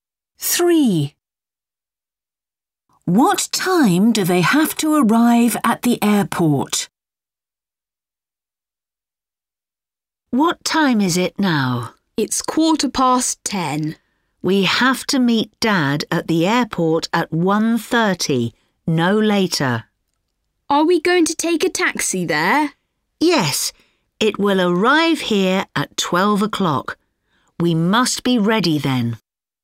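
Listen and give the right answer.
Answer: 1:30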